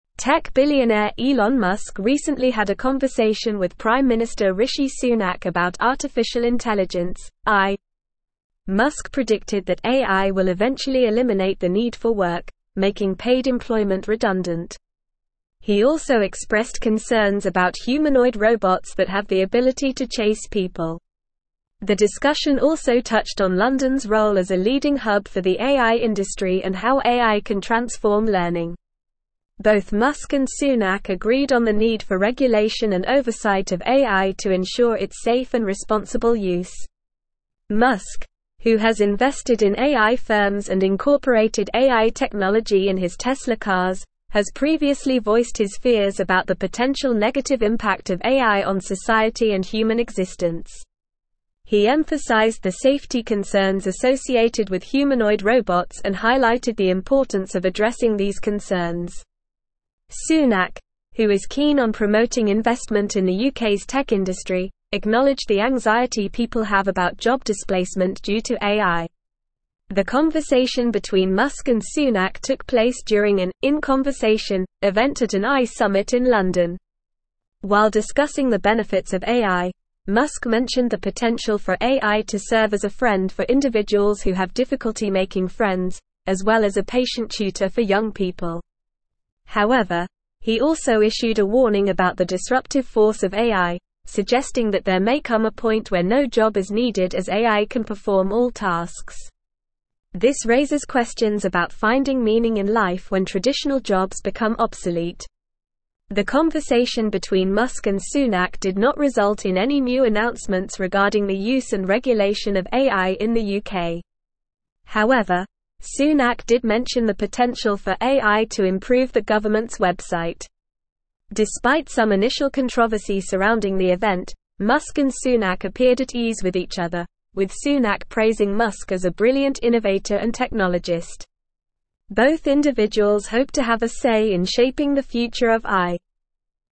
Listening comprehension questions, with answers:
Listen and Fill in the Gaps:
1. Tech billionaire Elon Musk recently had a conversation with Prime Minister Rishi Sunak about (1)______ intelligence (AI).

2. Musk predicted that AI will eventually (2)______ the need for work, (3)______ paid employment redundant.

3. Musk predicted that AI will eventually (2)______ the need for work, (3)______ paid employment redundant.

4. He also expressed concerns about (4)______ robots that have the ability to chase people.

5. Both Musk and Sunak agreed on the need for regulation and oversight of AI to (5)______ its safe and responsible use.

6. Musk, who has invested in AI firms and incorporated AI technology in his (6)______ cars, has previously voiced his fears about the potential negative impact of AI on society and human existence.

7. Sunak, who is keen on promoting (7)______ in the UK's tech (8)______, acknowledged the anxiety people have about job displacement due to AI.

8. Sunak, who is keen on promoting (7)______ in the UK's tech (8)______, acknowledged the anxiety people have about job displacement due to AI.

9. The conversation between Musk and Sunak took place during an "in conversation" (9)______ at an AI summit in London.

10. However, he also issued a warning about the (10)______ force of AI, suggesting that there may come a point where no job is (11)______ as AI can perform all tasks.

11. However, he also issued a warning about the (10)______ force of AI, suggesting that there may come a point where no job is (11)______ as AI can perform all tasks.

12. This raises questions about (12)______ meaning in life when traditional jobs (13)______ obsolete.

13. This raises questions about (12)______ meaning in life when traditional jobs (13)______ obsolete.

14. The conversation between Musk and Sunak did not (14)______ in any new announcements regarding the use and regulation of AI in the UK.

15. Despite some initial controversy surrounding the event, Musk and Sunak appeared at ease with each (15)______, with Sunak praising Musk as a brilliant innovator and technologist.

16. Both (16)______ hope to have a say in shaping the future of AI.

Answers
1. artificial
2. eliminate
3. making
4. humanoid
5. ensure
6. Tesla
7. investment
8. industry
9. event
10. disruptive
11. needed
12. finding
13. become
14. result
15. other
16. individuals

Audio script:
Tech billionaire Elon Musk recently had a conversation with Prime Minister Rishi Sunak about artificial intelligence (AI). Musk predicted that AI will eventually eliminate the need for work, making paid employment redundant. He also expressed concerns about humanoid robots that have the ability to chase people. The discussion also touched on London's role as a leading hub for the AI industry and how AI can transform learning. Both Musk and Sunak agreed on the need for regulation and oversight of AI to ensure its safe and responsible use.
Musk, who has invested in AI firms and incorporated AI technology in his Tesla cars, has previously voiced his fears about the potential negative impact of AI on society and human existence. He emphasized the safety concerns associated with humanoid robots and highlighted the importance of addressing these concerns. Sunak, who is keen on promoting investment in the UK's tech industry, acknowledged the anxiety people have about job displacement due to AI. The conversation between Musk and Sunak took place during an "in conversation" event at an AI summit in London.
While discussing the benefits of AI, Musk mentioned the potential for AI to serve as a friend for individuals who have difficulty making friends, as well as a patient tutor for young people. However, he also issued a warning about the disruptive force of AI, suggesting that there may come a point where no job is needed as AI can perform all tasks. This raises questions about finding meaning in life when traditional jobs become obsolete.
The conversation between Musk and Sunak did not result in any new announcements regarding the use and regulation of AI in the UK. However, Sunak did mention the potential for AI to improve the government's website. Despite some initial controversy surrounding the event, Musk and Sunak appeared at ease with each other, with Sunak praising Musk as a brilliant innovator and technologist. Both individuals hope to have a say in shaping the future of AI.

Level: Level 4